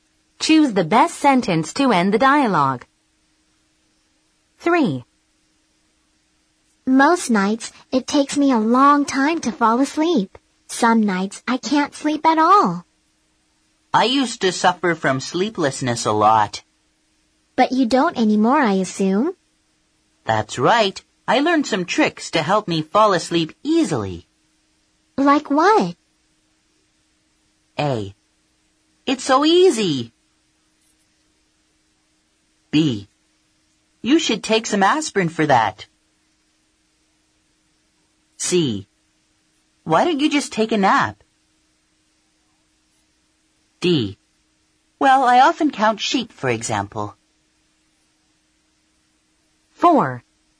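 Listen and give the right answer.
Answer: D: Well, I often count sheep, for example.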